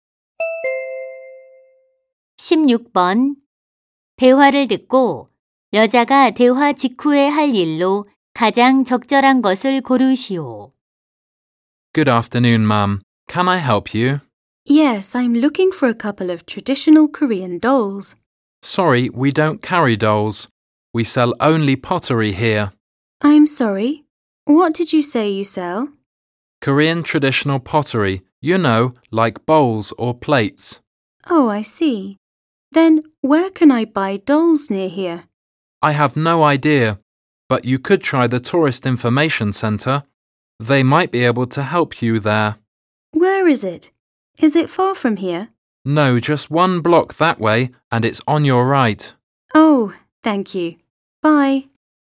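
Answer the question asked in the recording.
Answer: 관광 안내소에 가기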